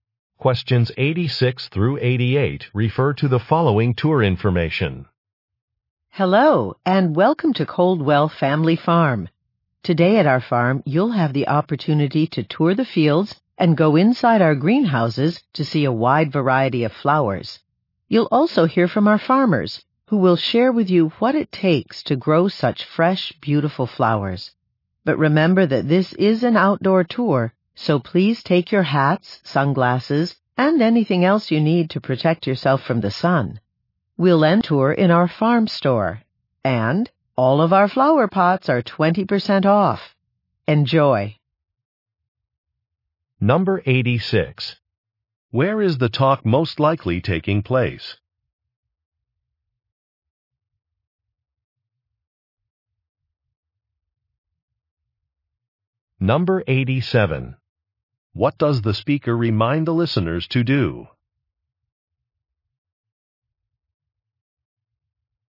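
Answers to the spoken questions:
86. On a flower farm
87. Protect themselves from the sun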